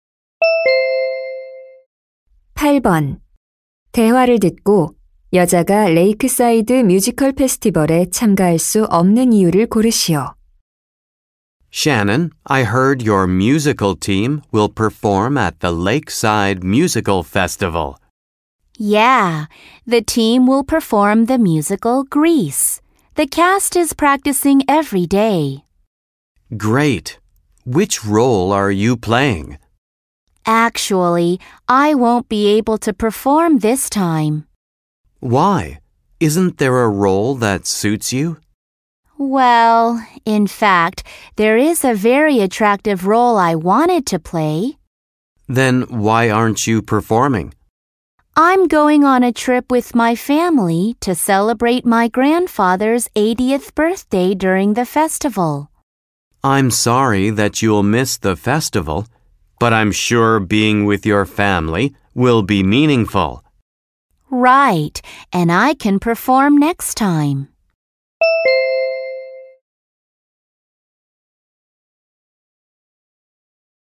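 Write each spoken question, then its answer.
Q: 대화를 듣고 여자가 레이크사이드 뮤지컬 페스티벌에 참가할 수 없는 이유를 고르시오.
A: 할아버지의 80번째 생신을 축하하러 가족 여행을 가서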